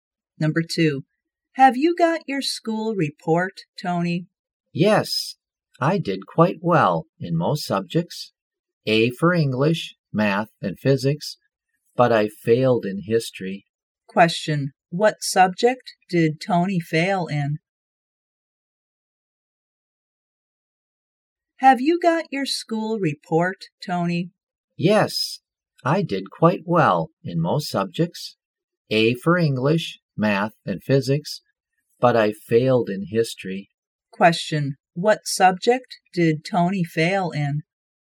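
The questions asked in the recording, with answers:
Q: what subject did Tony fail in?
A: History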